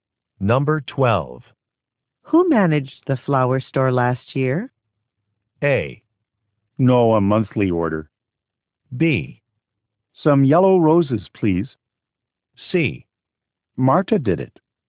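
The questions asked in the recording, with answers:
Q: Who managed the flower store last year?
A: C: Marta did it.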